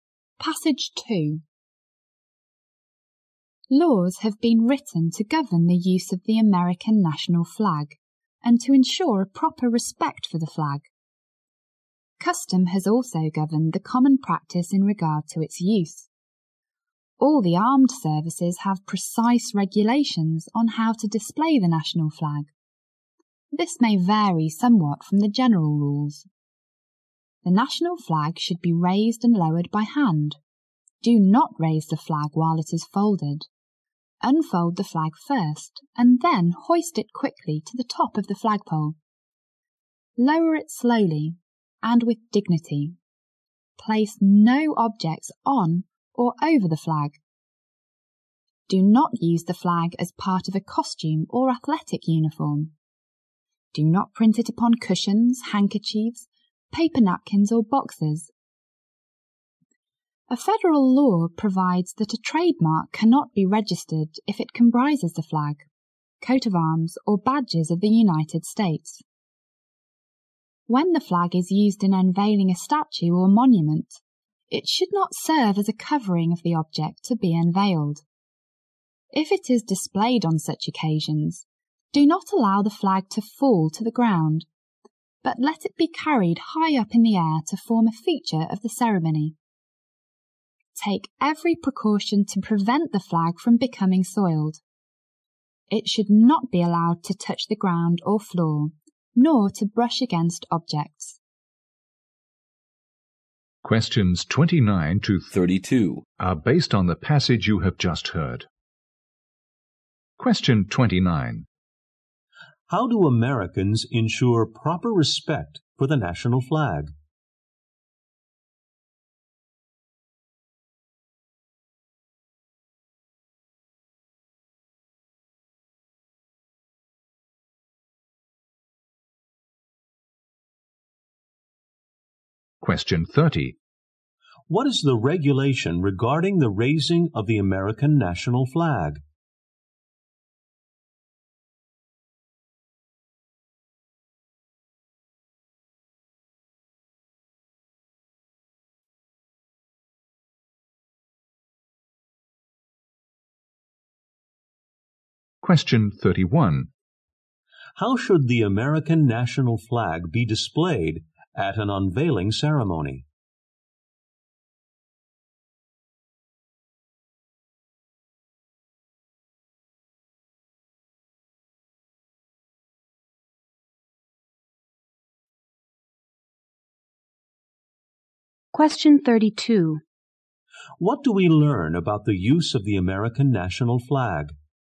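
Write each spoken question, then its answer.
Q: How do Americans ensure proper respect for the national flag?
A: Through laws and custom.

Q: What is the regulation regarding the raising of the American national flag?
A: Raise it by hand, unfolded first, and hoist it quickly.

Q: How should the American national flag be displayed at an unveiling ceremony?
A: Carried high in the air, not used as a covering and not allowed to fall.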